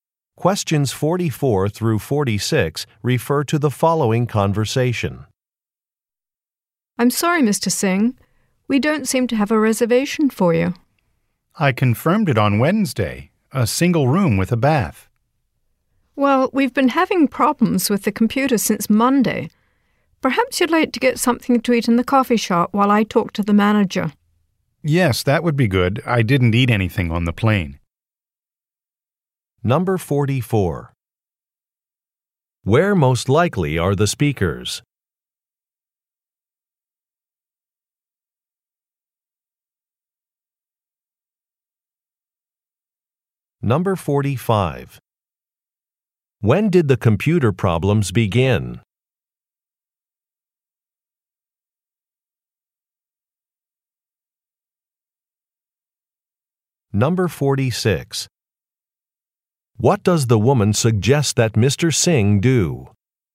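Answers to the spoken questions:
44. At a hotel front desk
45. On Monday
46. Get something to eat in the coffee shop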